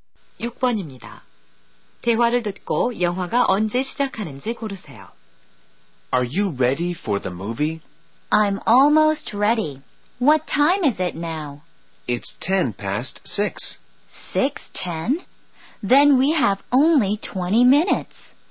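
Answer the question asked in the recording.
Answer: 6시 30분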